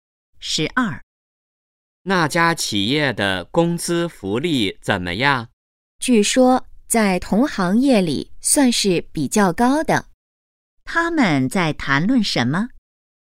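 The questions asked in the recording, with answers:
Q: 他们在谈论什么?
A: 那家企业的工资福利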